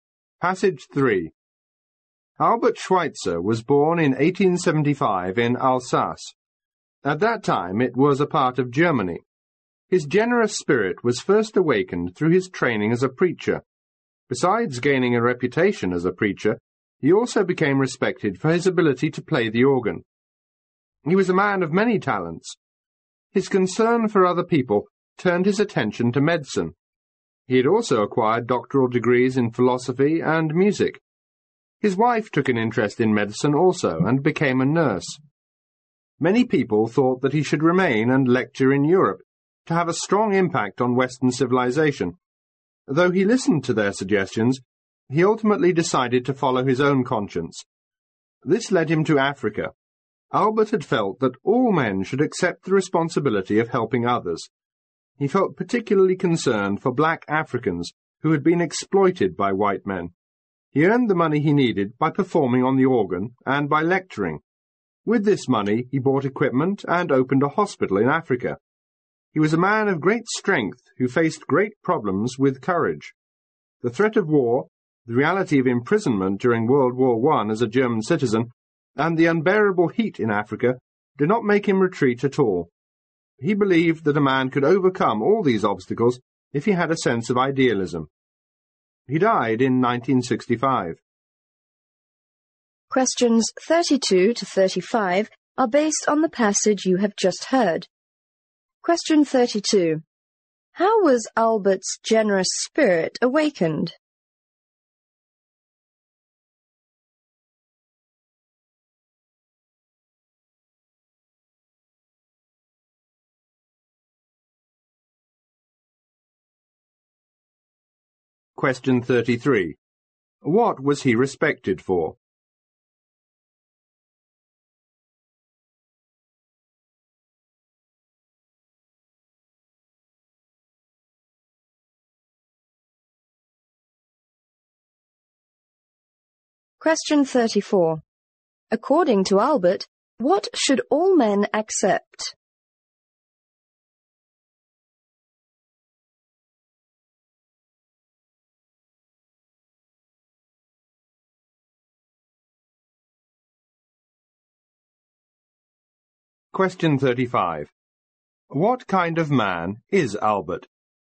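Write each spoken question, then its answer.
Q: How was Albert's generous spirit awakened?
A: Through his training as a preacher

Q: What was he respected for?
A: His ability to play the organ

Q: According to Albert, what should all men accept?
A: The responsibility of helping others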